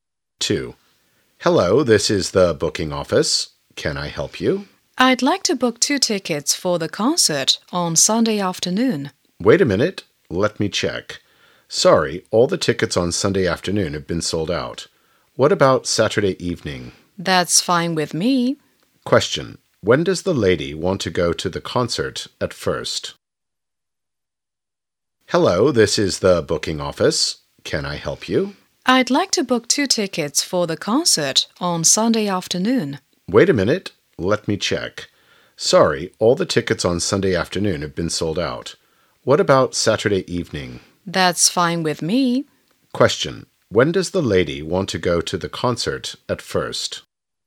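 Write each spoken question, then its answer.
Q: When does the lady want to go to the concert at first?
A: On Sunday afternoon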